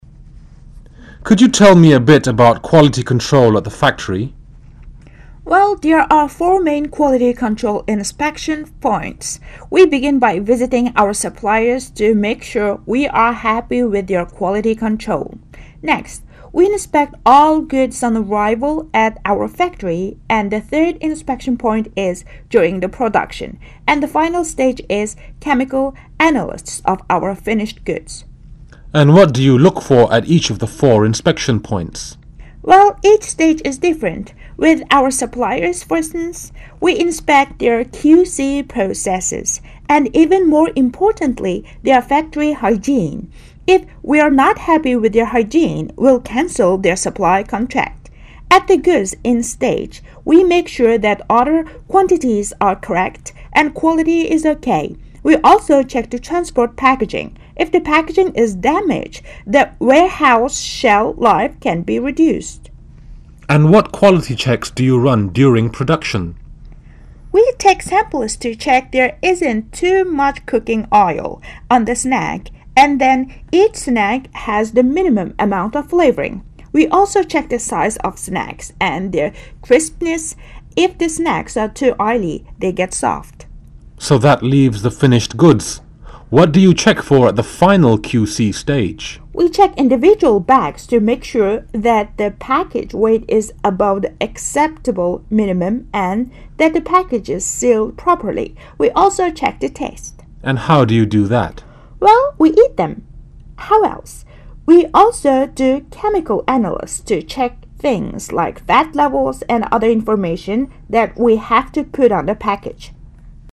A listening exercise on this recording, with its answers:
For each question 23-30, mark one letter (A, B or C) for the correct answer.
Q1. How many are there quality control inspection points?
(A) three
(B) four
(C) five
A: (B) four

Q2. What is the first stage of quality control?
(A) visiting our suppliers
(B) during production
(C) chemical analysis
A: (A) visiting our suppliers

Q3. What is the final stage of quality control?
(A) visiting suppliers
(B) during production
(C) chemical analysis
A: (C) chemical analysis

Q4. At first inspection stage, we inspect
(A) QC process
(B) hygiene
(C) QC process and hygiene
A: (C) QC process and hygiene

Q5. At goods stage, we make sure that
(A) quantities are correct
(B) quality is OK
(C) A and B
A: (C) A and B

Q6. How to check the quality during production?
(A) check every one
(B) take samples to check it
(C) check it at random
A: (B) take samples to check it

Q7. What do you check for at the final QC stage?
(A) check weight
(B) check package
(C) check weight, package and taste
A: (C) check weight, package and taste

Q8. How to check the taste?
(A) by eating them.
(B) by eating them and doing chemical analysis.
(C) by doing chemical analysis.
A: (B) by eating them and doing chemical analysis.

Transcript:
[解析] 23-30 V: Could you tell me a bit about quality control at the factory? P: Well, there are four main quality control inspection points. We begin by visiting our suppliers to make sure we are happy with their quality control. Next, e inspect all goods on arrival at our factory and the third inspection point is during production. And the final stage is chemical analysis of our finished goods. V: And what do you look for at each of the four inspection points? P: Well each stage is different. With our suppliers, for instance, we inspect their QC processes and, even more importantly, their factory hygiene. If we're not happy with their hygiene, we'll caned the supply contract. At the goods in stage we make sure that order quantities are correct and the quality is OK. We also check the transport packaging. If the packaging is damaged, the warehouse shelf-life can be reduced. V: And what quality checks do you run during production? P: We take samples to check there isn't too much cooking oil on the snack and that each snack has the minimum amount of flavouring. We also check the size of the snacks and their crispness. If the snacks are too oily, they go soft. V: So that leaves the finished goods. P: We check individual bags to make sure that the packet weight is above the acceptable minimum and that the packet is sealed properly. V: And how do you do that? P: Well, we eat them. We also do chemical analysis to check things like fat levels and other information that we have to put on the packets.

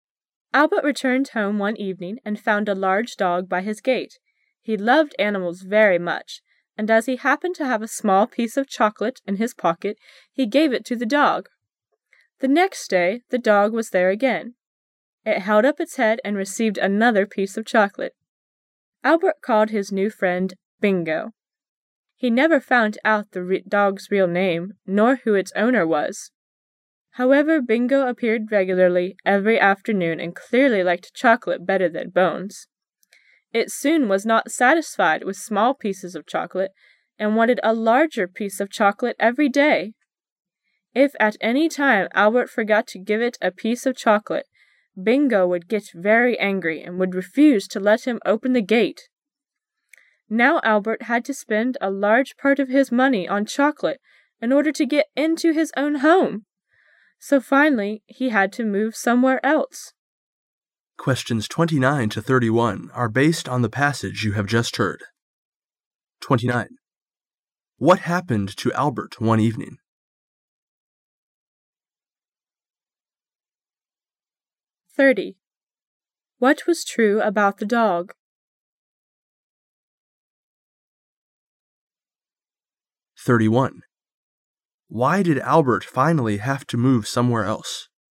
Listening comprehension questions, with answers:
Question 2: What was true about the dog?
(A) The dog's real name was Bingo.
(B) The dog belonged to one of Albert's neighbors.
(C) The dog was named Bingo by Albert.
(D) The dog loved bones very much.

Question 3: Why did Albert finally have to move somewhere else?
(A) Because the dog didn't appear any longer.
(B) Because Albert couldn't afford the chocolate any longer.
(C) Because Albert didn't love the dog animal.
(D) Because the dog died.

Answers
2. (C) The dog was named Bingo by Albert.
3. (B) Because Albert couldn't afford the chocolate any longer.

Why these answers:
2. [详细解答] 该题需核实关于这条狗的评述。听时把握关键词,called his new friend "Bingo",由此可确定正确答案为C。
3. [详细解答] 该题询问事件原因。听时把握关键词spend a large part of his money on...由此可推知与钱有关,因此选择选项B。

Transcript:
[解析] 29-31 Albert returned home one evening and found a large dog by his gate. He loved animals very much and as he happened to have a small piece of chocolate in his pocket, he gave it to the dog. The next day, the dog was there again. It held up its head and received another piece of chocolate. Albert called his new friend" Bingo". He never found out the dog's real name, nor who its owner was. However, Bingo appeared regularly every afternoon and clearly liked chocolate better than bones. It soon was not satisfied with small pieces of chocolate and wanted a large piece of chocolate every day. If at any time Albert forgot to give it a piece of chocolate, Bingo would get very angry and would refuse to let him open the gate. Now Albert had to spend a large part of his money on chocolate in order to get into his own home! So finally he had to move somewhere else. 29.What happened to Albert one evening?

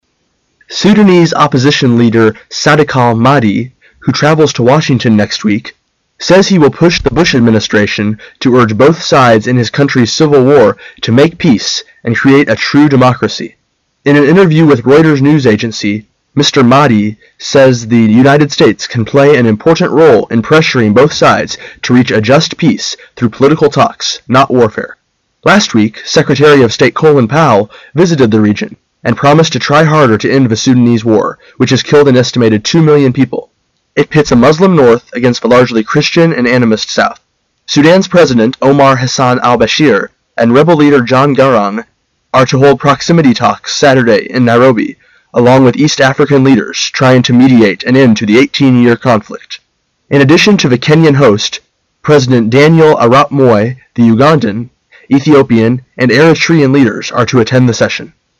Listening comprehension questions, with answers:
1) Where will Sunday's meeting be held?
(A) Sudan.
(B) U.S.A.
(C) Kenyan.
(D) Uganda.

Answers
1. (C) Kenyan.

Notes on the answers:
本题是细节题。 [详细解答] 几个非洲国家首脑周六将在Nairobi(内罗毕)开会,如果知道内罗毕是肯尼亚首都更好;听到最后一句In addition to the Kenyan host,即可知肯尼亚是东道主。所以选C项。

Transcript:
[解析] 21-23 Sudanese opposition leader Sadeqal-Mahdi, who travels to Washington next week, says he will push the Bush administration to urge both sides in his country's civil war to make peace and create a true democracy. In an interview with Reuters news agency, Mr. Mahdi says the United States can play an important role in pressuring both sides to reach a just peace through political talks, not war-fare. Last week, Secretary of State Colin Powell visited the region and promised to try harder to end the Sudanese war, which has killed an estimated two million people. It pits the Muslim north against the largely Christian and animist south. Sudan's President Omar Hassan Al-Bashir and rebel leader John Garang are to hold proximity talks Saturday in Nairobi along with east African leaders trying to mediate an end to the 18 year conflict. In addition to the Kenyan host, President Daniel- arap Moi, the Ugandan, Ethiopian and Eritrean leaders are to attend the session.

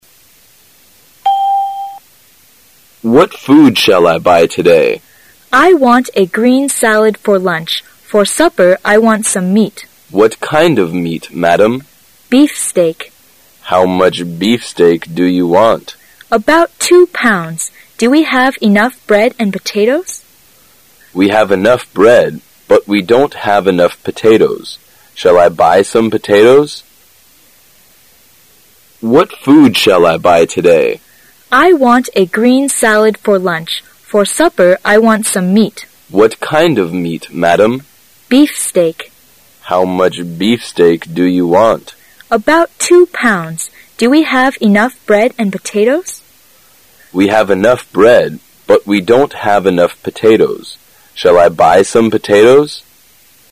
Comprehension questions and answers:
How much meat do they want to buy?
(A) About 20 pounds.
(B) About 2 pounds.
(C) About 3 pound.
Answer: (B) About 2 pounds.

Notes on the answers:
"About 2 pounds."是对"How much beefsteak?"的回答。故本题答案为B。

